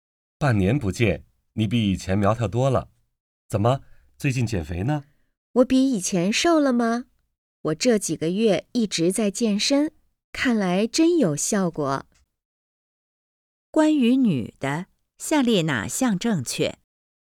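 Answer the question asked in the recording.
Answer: 她一直在健身,变瘦了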